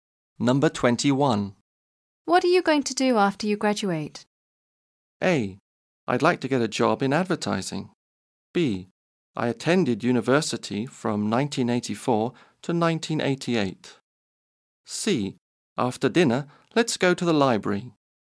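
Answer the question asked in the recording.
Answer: A: I'd like to get a job in advertising.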